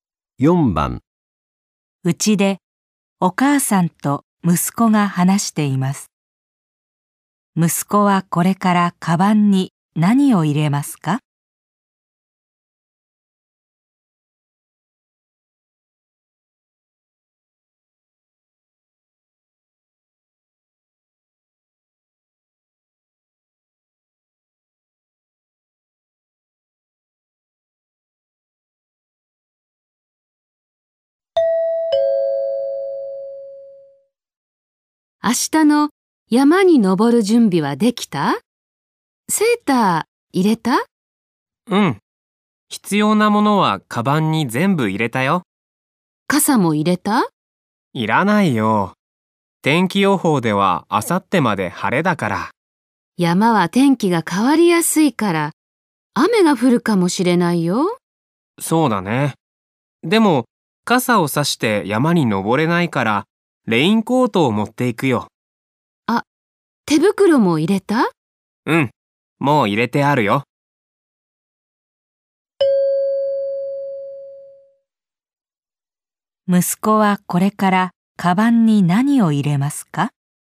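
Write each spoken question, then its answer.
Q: 息子はこれからカバンに何を入れますか?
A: レインコート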